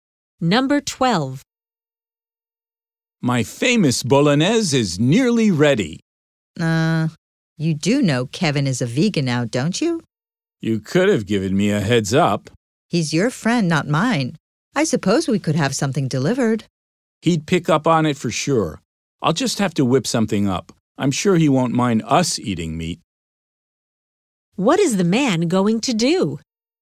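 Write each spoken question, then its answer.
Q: What is the man going to do?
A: Quickly make a vegan dish for Kevin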